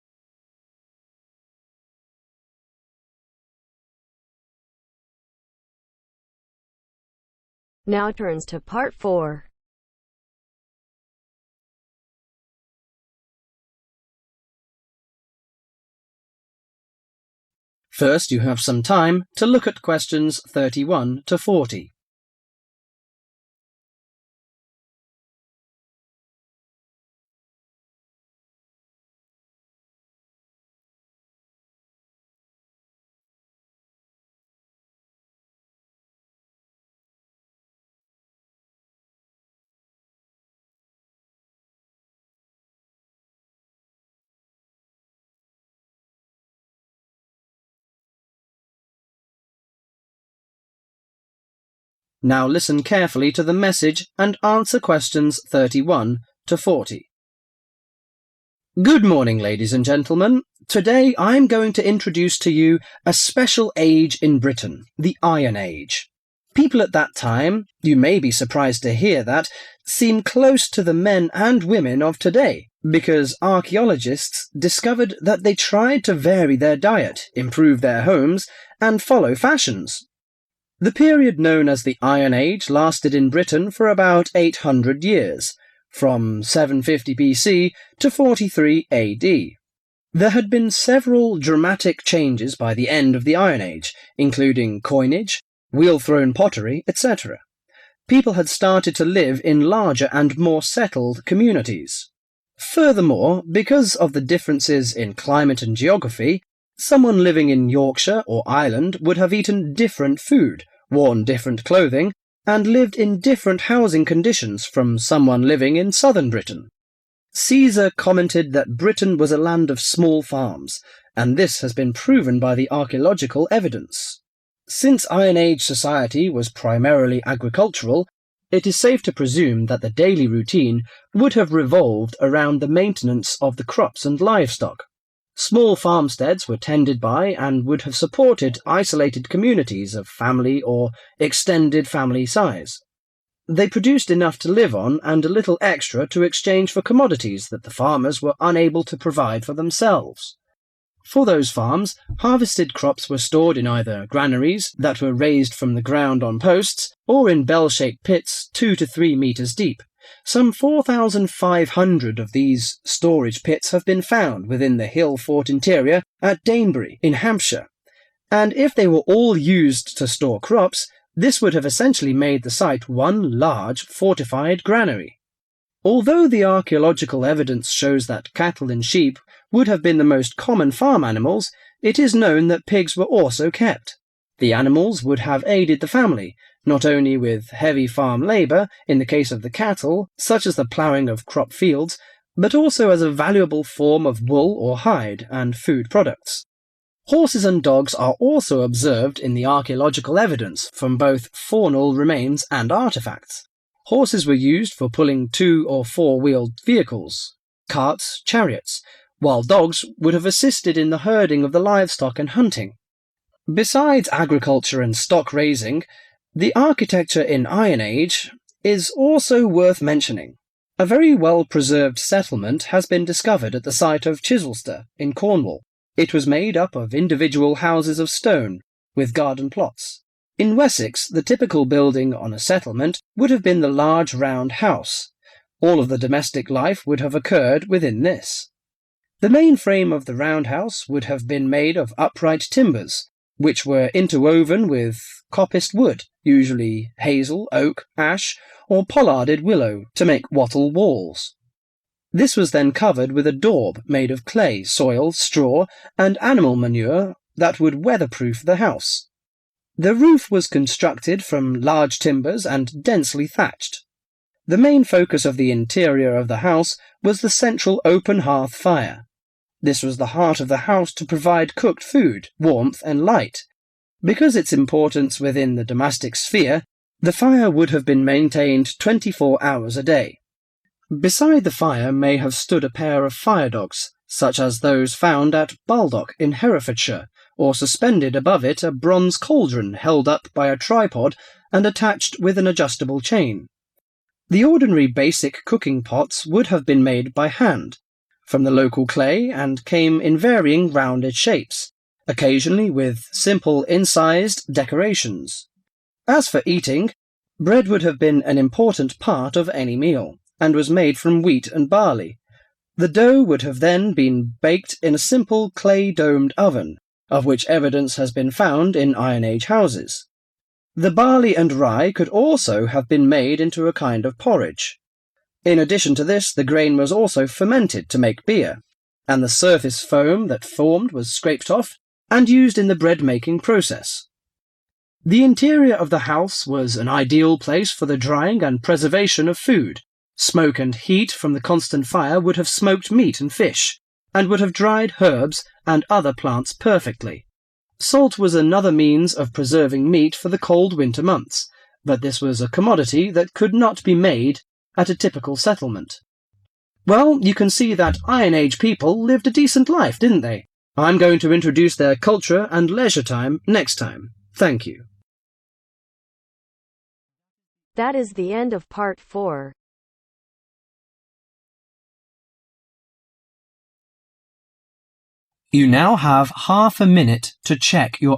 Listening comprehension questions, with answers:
Complete the notes below. Write NO MORE THAN THREE WORDS for each answer.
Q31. From 750 B. C. to 31...............................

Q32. The life in the north and south was quite different due to 32.................................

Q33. The daily life was mainly to maintain 33......................................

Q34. The crops were stored in granaries, or in 34.................................. 2-3-meter-deep pits.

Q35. The most common farm animals were 35.................., ...................... And ......................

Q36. In Cornwall. The settlement was made up of 36..................................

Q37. The main frame of roundhouses was 37...............................................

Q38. The open fire in the house provided cooked food, 38............................. And ..................... food with bread and porridge as the main food, people also fermented grains to make 39..............................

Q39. people also fermented grains to make 39..............................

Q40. Besides smoke and heat. People also used 40............................... To preserve meat.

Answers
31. 43 AD
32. Climate (and) Geography
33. Crops, Livestock
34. Bell-shaped pits
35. Cattle, Sheep, Pigs
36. Stone
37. Upright Timbers
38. Warmth, light
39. Beer
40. Salt